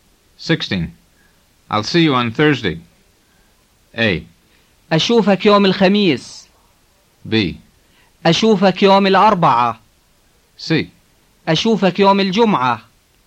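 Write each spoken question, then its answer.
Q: I'll see you on Thursday.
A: A: أشوفك يوم الخميس.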